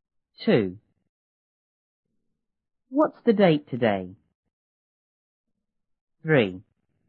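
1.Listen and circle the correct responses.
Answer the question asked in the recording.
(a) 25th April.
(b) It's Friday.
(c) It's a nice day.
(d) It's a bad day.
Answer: (a) 25th April.

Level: 初中英语广州版1B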